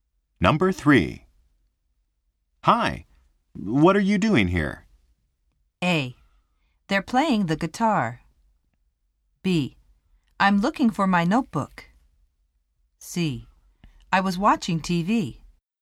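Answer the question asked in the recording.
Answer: B: I'm looking for my notebook.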